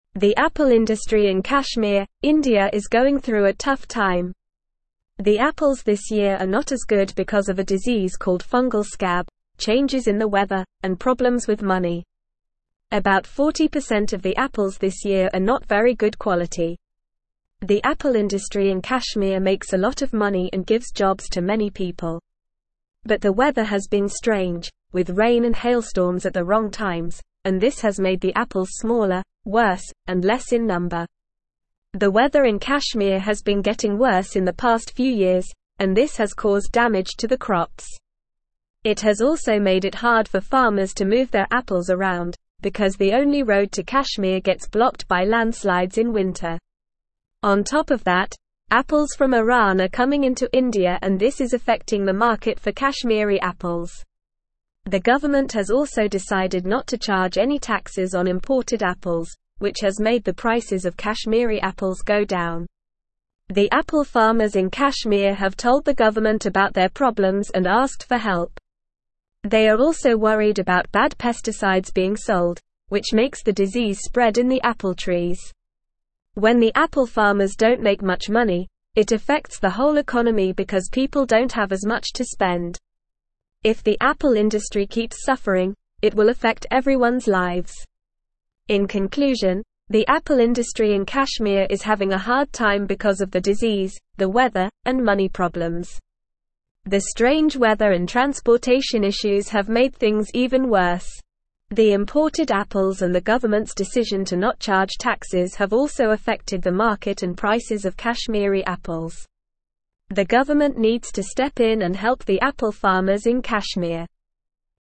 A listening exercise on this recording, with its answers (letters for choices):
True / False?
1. The apple industry in Kashmir, India is thriving due to a disease called fungal scab and despite changes in the weather and financial problems.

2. Apple farmers in Kashmir have sought assistance from the government and expressed concerns about the sale of harmful pesticides that contribute to the spread of the disease in apple trees.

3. The market for Kashmiri apples remains unaffected by the importation of apples from Iran, despite the government's decision to waive taxes on imported apples.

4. The apple industry in Kashmir is an insignificant source of income and employment for few people.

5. The worsening weather in Kashmir over the past few years has caused crop damage and made transportation of apples challenging due to landslides blocking the only road to the region during winter.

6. The struggling apple industry in Kashmir has a ripple effect on the overall economy, as reduced income for farmers means people have less money to spend, impacting everyone's lives.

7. Favorable weather conditions, including rain and hailstorms at the right times, have resulted in bigger, higher quality, and increased quantities of apples.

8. Approximately 40% of the apples produced this year in Kashmir are of low quality.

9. What is the main reason why the apples in Kashmir are not as good this year?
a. Lack of water and sunlight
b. Fungal scab, changes in weather, and money problems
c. Insects and pests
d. Poor quality soil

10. How much of the apples this year in Kashmir are of low quality?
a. About 60%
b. About 20%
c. About 80%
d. About 40%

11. What has been causing damage to the crops in Kashmir?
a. Lack of pesticides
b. Worsening weather conditions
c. Overuse of fertilizers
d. Poor irrigation systems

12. Why is it difficult for farmers to transport their apples in Kashmir?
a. Lack of proper transportation vehicles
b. High transportation costs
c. The only road gets blocked by landslides in winter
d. Government regulations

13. What is affecting the market for Kashmiri apples?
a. Apples from China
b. Apples from Pakistan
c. Apples from Afghanistan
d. Apples from Iran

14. What has the government decided to do regarding imported apples?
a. Not charge any taxes on them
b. Increase taxes on them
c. Ban them completely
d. Subsidize their prices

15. What are the apple farmers in Kashmir worried about regarding pesticides?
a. Lack of availability of pesticides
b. High prices of pesticides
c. Bad pesticides being sold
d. Government regulations on pesticides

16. Why does the suffering of the apple industry in Kashmir affect everyone's lives?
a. It affects the whole economy as people have less money to spend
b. It causes pollution in the region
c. It leads to an increase in crime rates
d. It results in a shortage of food in the market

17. The apple (1)______ in Kashmir, India is going through a tough time.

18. The apples this year are not as good because of a disease called fungal scab, changes in the weather, and problems with (2)______.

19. But the weather has been (3)______, with rain and hailstorms at the (4)______ times, and this has made the apples smaller, worse, and less in (5)______.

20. But the weather has been (3)______, with rain and hailstorms at the (4)______ times, and this has made the apples smaller, worse, and less in (5)______.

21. But the weather has been (3)______, with rain and hailstorms at the (4)______ times, and this has made the apples smaller, worse, and less in (5)______.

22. The weather in (6)______ has been getting worse in the past few years, and this has (7)______ damage to the crops.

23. The weather in (6)______ has been getting worse in the past few years, and this has (7)______ damage to the crops.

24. On top of that, apples from Iran are coming into India and this is affecting the (8)______ for Kashmiri apples.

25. The government has also decided not to charge any (9)______ on imported apples, which has made the prices of Kashmiri apples go down.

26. The apple farmers in Kashmir have told the government about their problems and (10)______ for help.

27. They are also worried about bad pesticides being sold, which makes the disease spread in the apple (11)______.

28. When the apple farmers don't make much money, it affects the whole (12)______ because people don't have as much to spend.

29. If the apple industry keeps suffering, it will (13)______ everyone's lives.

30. The imported apples and the (14)______'s (15)______ to not charge taxes have also affected the market and prices of Kashmiri apples.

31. The imported apples and the (14)______'s (15)______ to not charge taxes have also affected the market and prices of Kashmiri apples.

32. The government (16)______ to step in and help the apple farmers in Kashmir.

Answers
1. False
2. True
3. False
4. False
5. True
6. True
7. False
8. True
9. b
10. d
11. b
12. c
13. d
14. a
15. c
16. a
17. industry
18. money
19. strange
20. wrong
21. number
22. Kashmir
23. caused
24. market
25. taxes
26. asked
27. trees
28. economy
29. affect
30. government
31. decision
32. needs

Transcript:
The apple industry in Kashmir, India is going through a tough time. The apples this year are not as good because of a disease called fungal scab, changes in the weather, and problems with money. About 40% of the apples this year are not very good quality. The apple industry in Kashmir makes a lot of money and gives jobs to many people. But the weather has been strange, with rain and hailstorms at the wrong times, and this has made the apples smaller, worse, and less in number.
The weather in Kashmir has been getting worse in the past few years, and this has caused damage to the crops. It has also made it hard for farmers to move their apples around, because the only road to Kashmir gets blocked by landslides in winter. On top of that, apples from Iran are coming into India and this is affecting the market for Kashmiri apples. The government has also decided not to charge any taxes on imported apples, which has made the prices of Kashmiri apples go down.
The apple farmers in Kashmir have told the government about their problems and asked for help. They are also worried about bad pesticides being sold, which makes the disease spread in the apple trees. When the apple farmers don't make much money, it affects the whole economy because people don't have as much to spend. If the apple industry keeps suffering, it will affect everyone's lives.
In conclusion, the apple industry in Kashmir is having a hard time because of the disease, the weather, and money problems. The strange weather and transportation issues have made things even worse. The imported apples and the government's decision to not charge taxes have also affected the market and prices of Kashmiri apples. The government needs to step in and help the apple farmers in Kashmir.

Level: Level 3